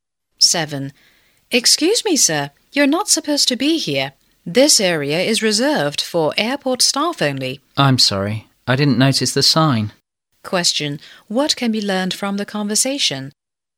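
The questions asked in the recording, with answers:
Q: What can be learned from the conversation?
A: The man went into an area for airport staff only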